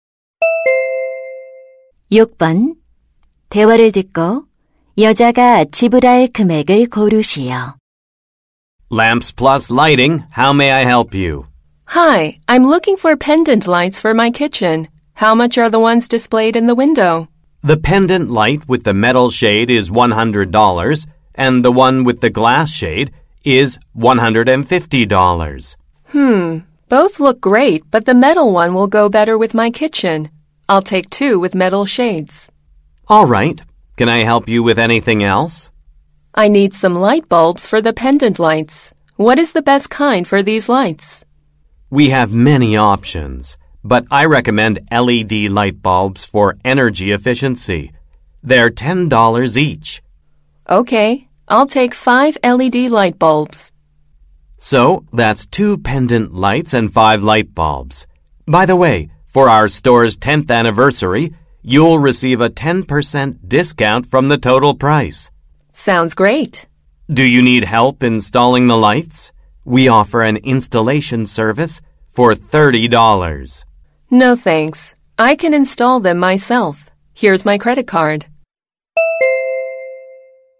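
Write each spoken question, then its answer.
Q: 대화를 듣고 여자가 지불할 금액을 고르시오.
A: $225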